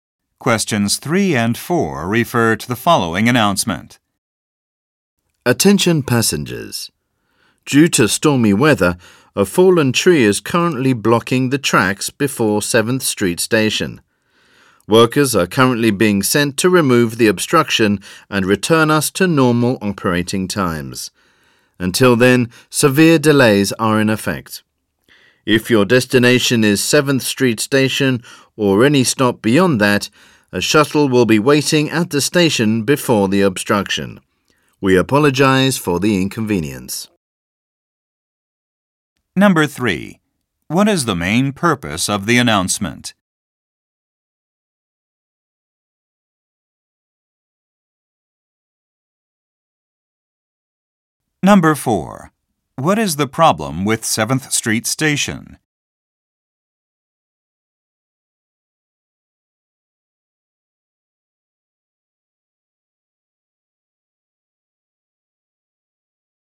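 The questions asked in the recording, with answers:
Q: What is the main purpose of the announcement?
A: To announce a delay caused by a blocked track

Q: What is the problem with 7th Street Station?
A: A fallen tree is blocking the tracks before it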